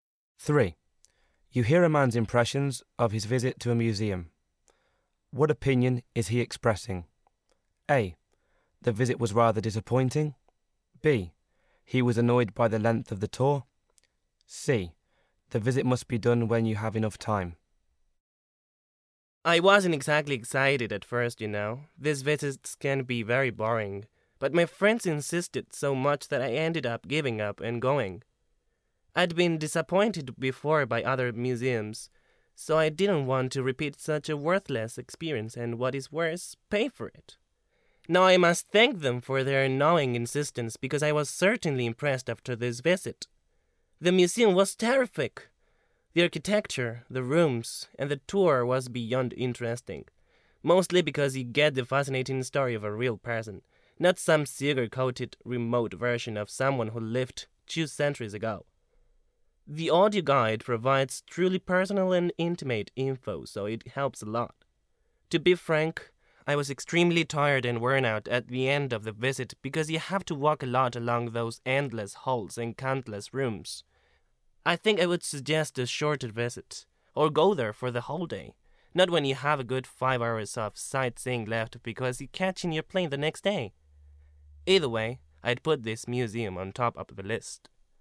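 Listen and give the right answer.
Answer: C: The visit must be done when you have enough time.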